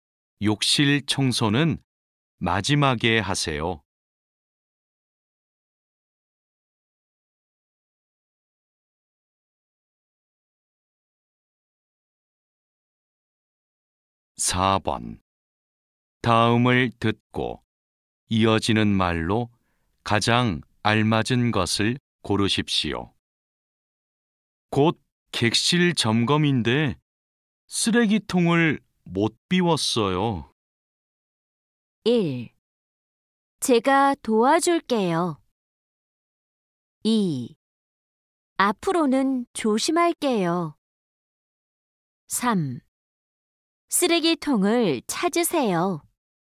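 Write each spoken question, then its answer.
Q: 곧 객실 점검인데 쓰레기통을 못 비웠어요.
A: 1: 제가 도와줄게요.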